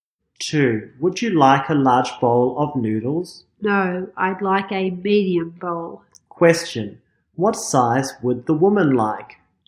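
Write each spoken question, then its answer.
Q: What size would the woman like?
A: A medium bowl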